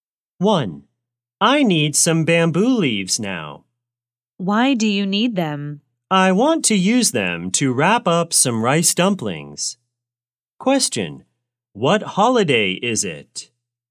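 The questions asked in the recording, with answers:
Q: What holiday is it?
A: The Dragon Boat Festival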